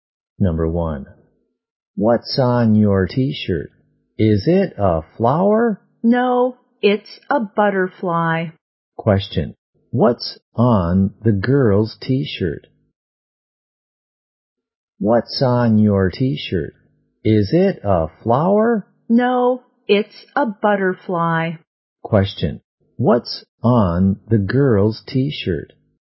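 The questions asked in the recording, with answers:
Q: what's on the girl's T-shirt?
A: A butterfly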